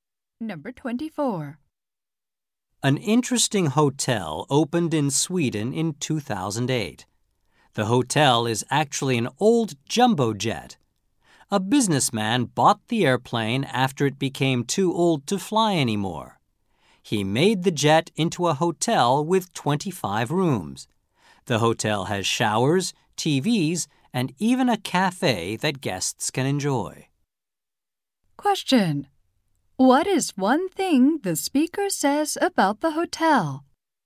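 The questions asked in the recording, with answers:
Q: Question. What is one thing the speaker says about the hotel?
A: It is an old jumbo jet.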